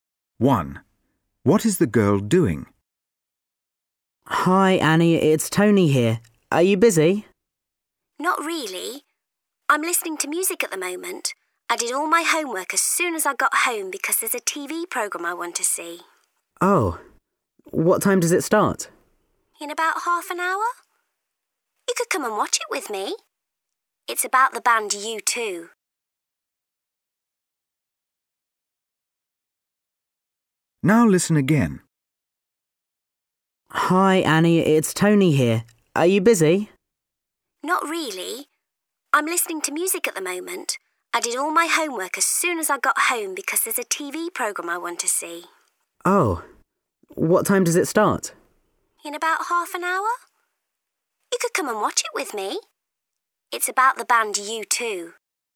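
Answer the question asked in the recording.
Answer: Listening to music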